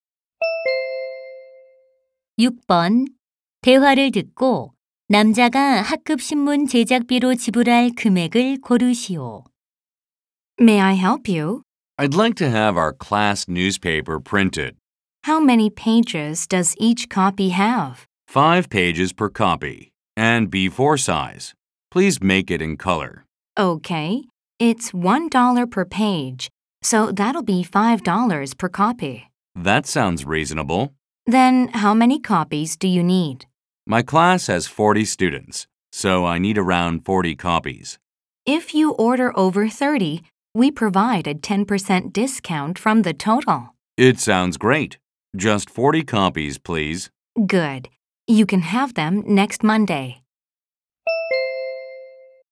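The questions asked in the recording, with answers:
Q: 대화를 듣고 남자가 학급 신문 제작비로 지불할 금액을 고르시오.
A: 180달러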